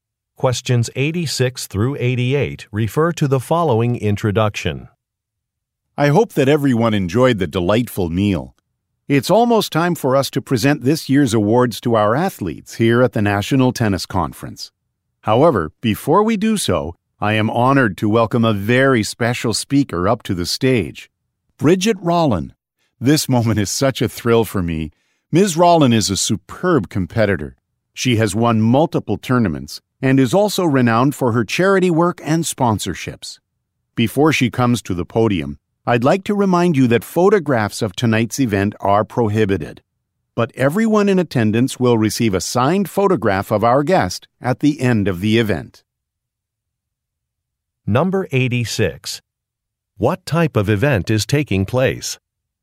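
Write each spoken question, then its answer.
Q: What type of event is taking place?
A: An awards dinner at a tennis conference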